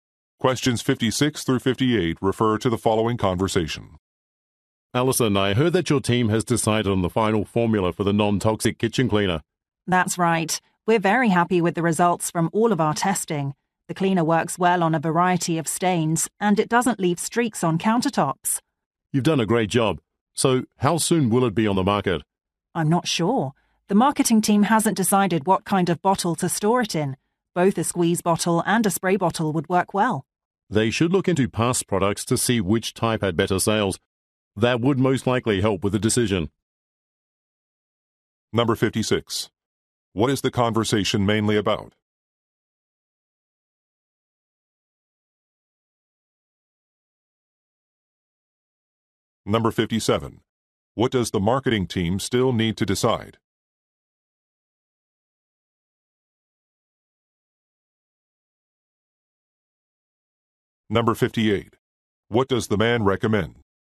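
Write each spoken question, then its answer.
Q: What is the conversation mainly about?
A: A new non-toxic kitchen cleaner

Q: What does the marketing team still need to decide?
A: What kind of bottle to use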